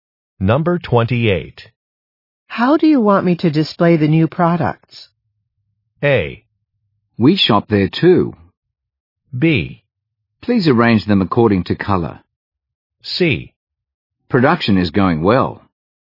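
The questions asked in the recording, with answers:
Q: How do you want me to display the new products?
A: B: Please arrange them according to color.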